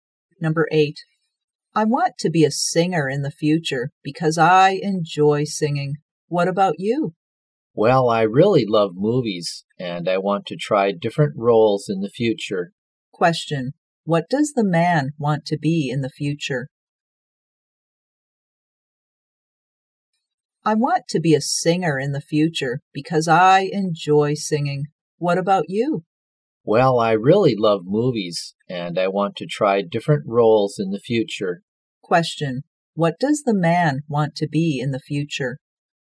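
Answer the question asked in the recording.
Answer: An actor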